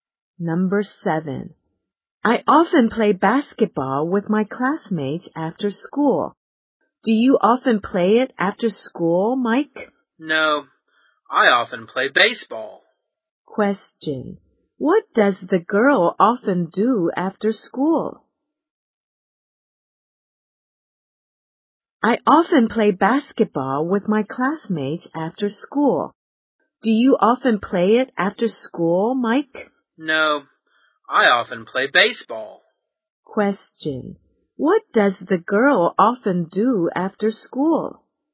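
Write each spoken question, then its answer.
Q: What does the girl often do after school?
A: She plays basketball with her classmates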